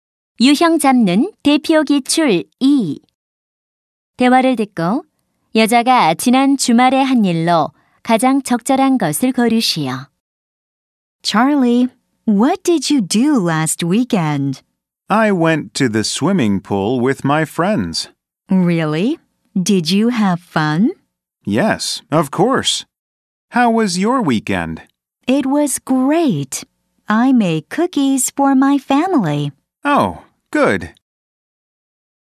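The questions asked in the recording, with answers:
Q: 대화를 듣고 여자가 지난 주말에 한 일로 가장 적절한 것을 고르시오.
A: 가족을 위해 쿠키 만들기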